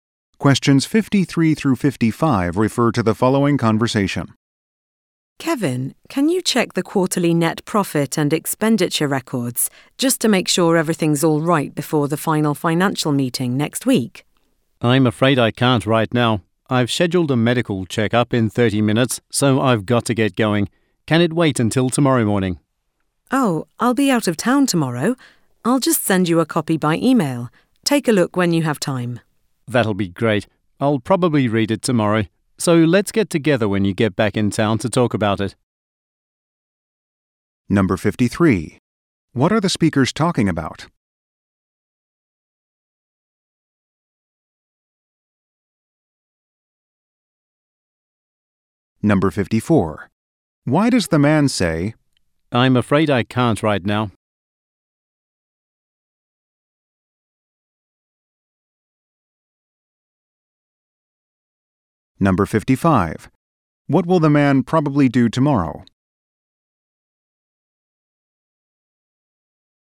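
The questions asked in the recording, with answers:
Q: What are the speakers talking about?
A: Checking quarterly financial records

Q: Why does the man say, I'm afraid I can't right now?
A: He has to leave for a medical checkup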